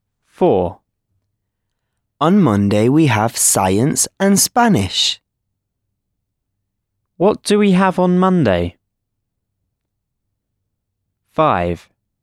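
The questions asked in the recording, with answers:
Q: What do we have on Monday?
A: science and Spanish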